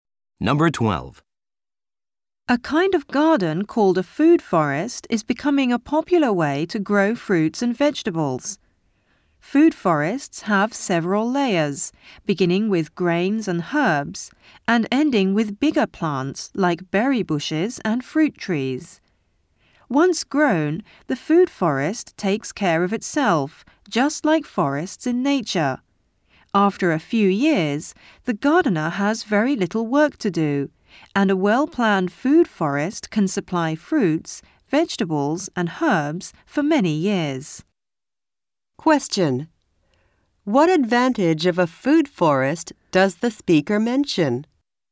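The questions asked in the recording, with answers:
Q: What advantage of a food forest does the speaker mention?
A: After a few years it takes care of itself and needs very little work.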